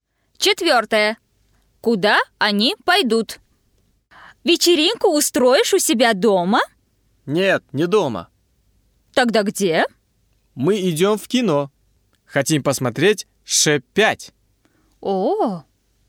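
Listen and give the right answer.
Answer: В кино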